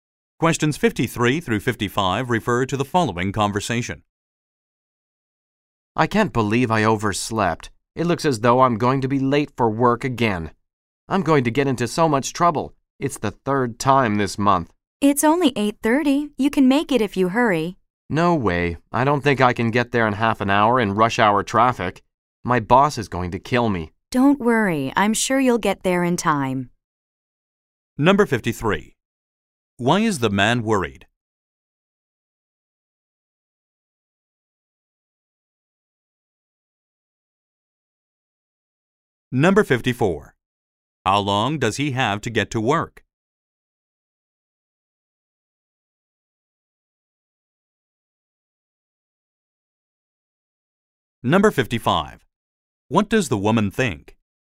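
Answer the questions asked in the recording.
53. He overslept and will be late for work
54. Half an hour
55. He will get there in time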